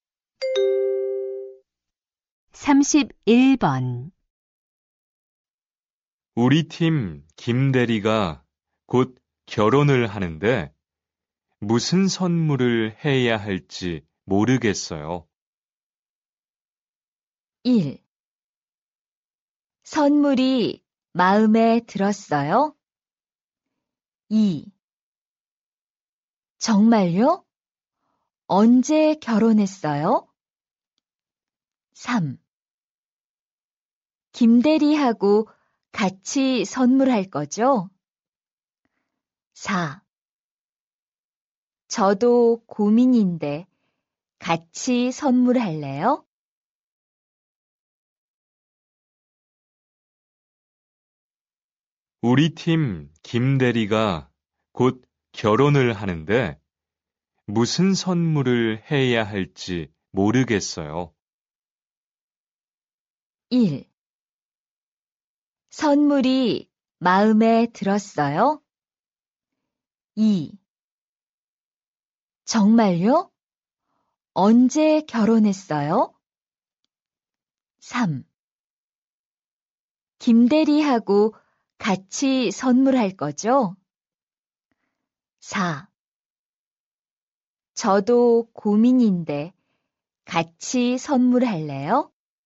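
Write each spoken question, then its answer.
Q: 우리 팀 김대리가 곧 결혼을 하는데 무슨 선물을 해야 할지 모르겠어요.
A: 4: 저도 고민인데 같이 선물할래요?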